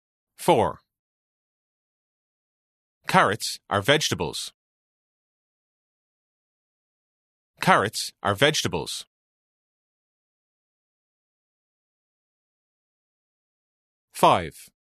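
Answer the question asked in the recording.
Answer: True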